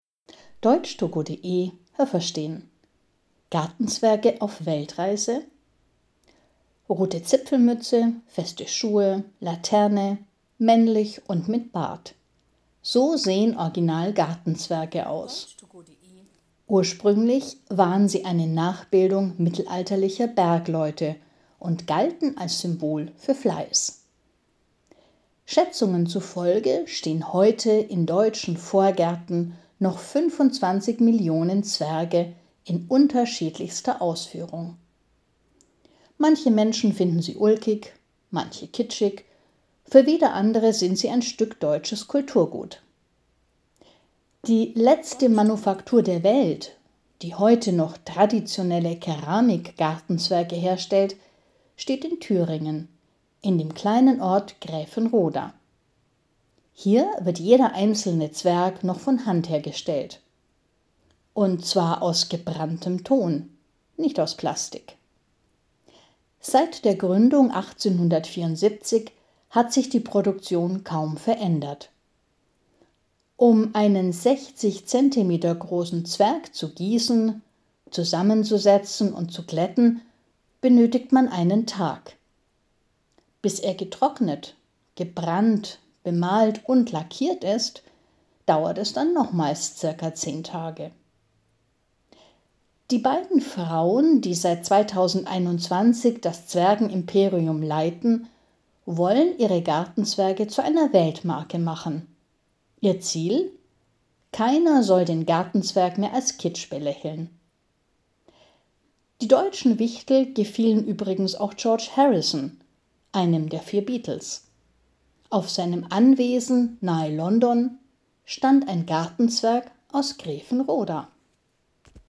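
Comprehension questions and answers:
Haben Sie das gehört? Stimmt diese Aussage?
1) Die Original-Gartenzwerge sind männlich und sahen ursprünglich aus wie Männer, die in den Bergen leben.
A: Nein, das habe ich nicht gehört.

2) In deutschen Gärten stehen rund 25 Millionen Gartenzwerge.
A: Ja, das habe ich gehört.

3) Manche Menschen sind der Meinung, Gartenzwerge haben keinen künstlerischen Wert, andere halten sie für deutsches Kulturgut.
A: Ja, das habe ich gehört.

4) Es gibt weltweit nur noch eine Manufaktur in Thüringen, die Gartenzwerge aus Plastik herstellt.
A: Nein, das habe ich nicht gehört.

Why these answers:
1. Sie sind männlich, das stimmt. Aber sie sahen ursprünglich nicht wie Bergbewohner aus, sondern wie Bergleute. Also wie Männer, die in Bergwerken arbeiten.
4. Die Gartenzwergmanufaktur in Thüringen (Gräfenroda) ist die einzige auf der Welt, die traditionelle Keramik-Gartenzwerge herstellt.

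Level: B2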